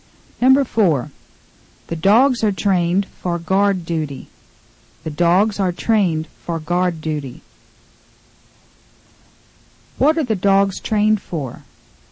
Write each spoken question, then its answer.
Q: What are the dogs trained for?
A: They are trained for guard duty.